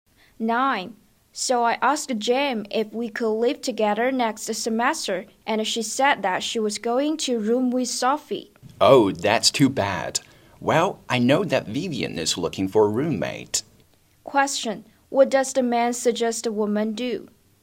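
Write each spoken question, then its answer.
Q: What does the man suggest a woman do?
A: Ask Vivian to be her roommate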